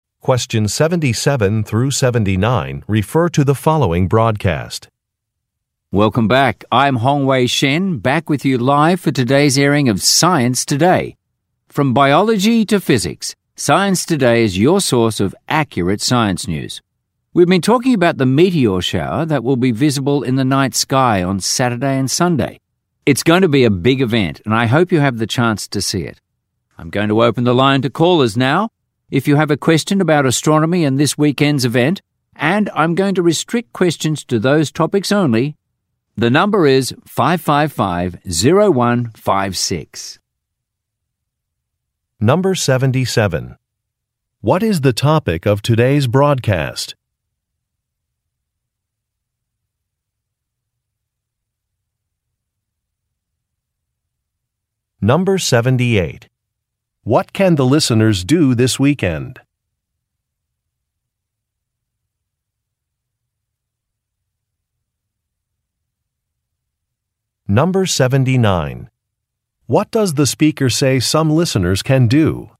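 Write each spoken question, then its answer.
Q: What can the listeners do this weekend?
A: See a meteor shower in the night sky

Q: What does the speaker say some listeners can do?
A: Call in with questions about astronomy and the weekend event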